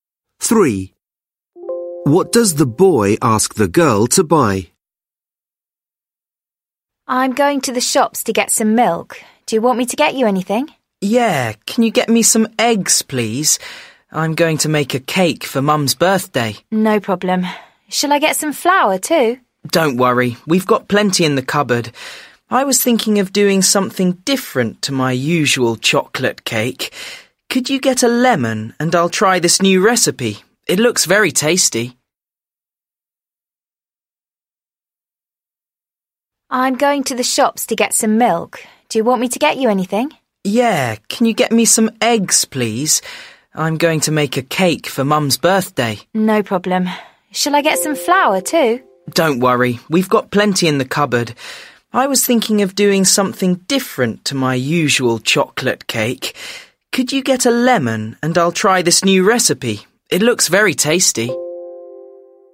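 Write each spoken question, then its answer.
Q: What does the boy ask the girl to buy?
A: Eggs and a lemon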